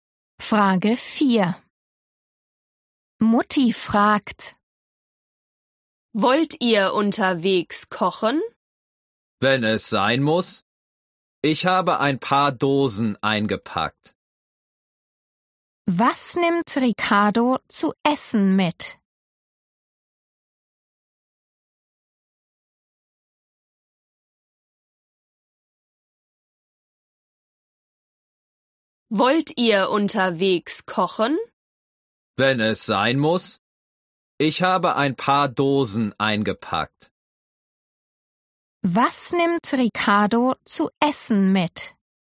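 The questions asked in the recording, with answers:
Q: Was nimmt Ricardo zu essen mit?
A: ein paar Dosen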